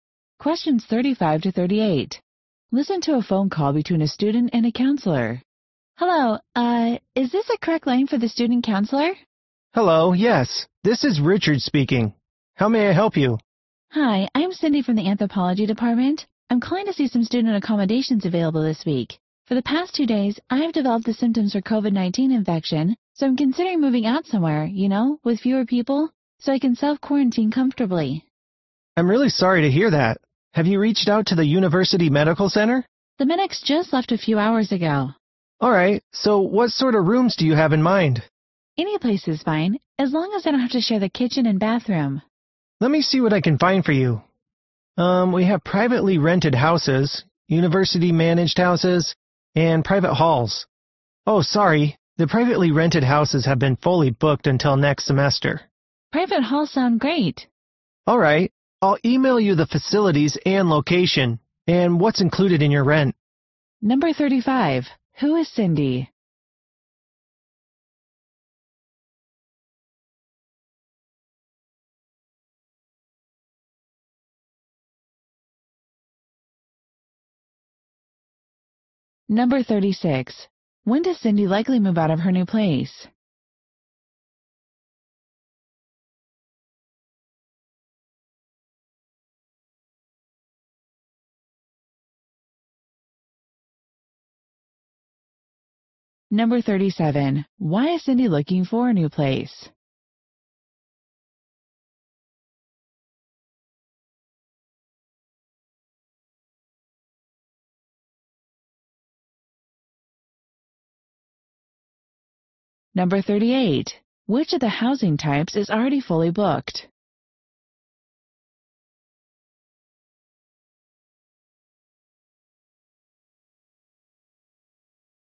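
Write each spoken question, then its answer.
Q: Who is Cindy?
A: A student from the Anthropology Department

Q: Why is Cindy looking for a new place?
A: She has COVID-19 symptoms and wants to self-quarantine

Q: Which of the housing types is already fully booked?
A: Privately rented houses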